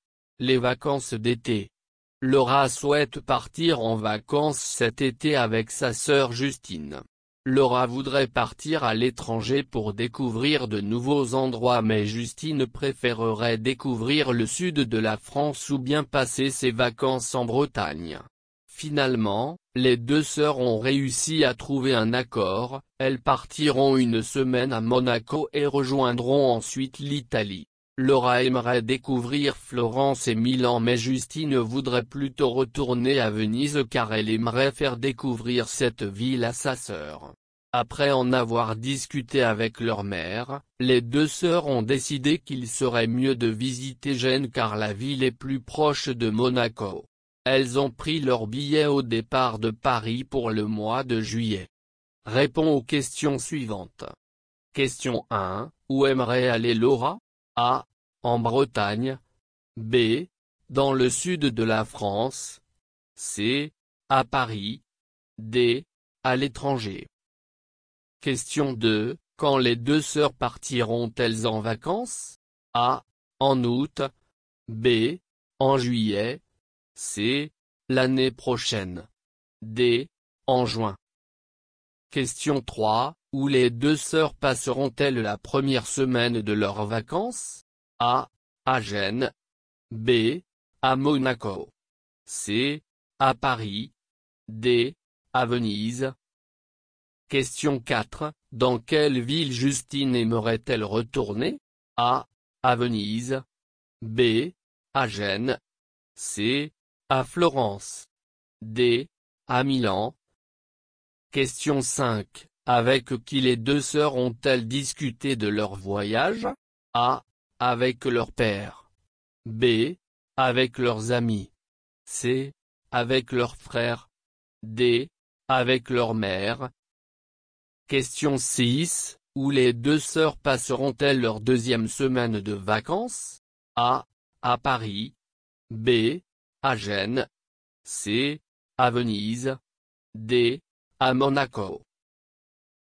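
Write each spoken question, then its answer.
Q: Où aimerait aller Laura?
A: D: À l'étranger.

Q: Quand les deux sœurs partiront-elles en vacances?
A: B: En juillet.

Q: Où les deux sœurs passeront-elles la première semaine de leurs vacances?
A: B: À Monaco.

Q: Dans quelle ville Justine aimerait-elle retourner?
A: A: À Venise.

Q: Avec qui les deux sœurs ont-elles discuté de leur voyage?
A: D: Avec leur mère.

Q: Où les deux sœurs passeront-elles leur deuxième semaine de vacances?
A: B: À Gênes.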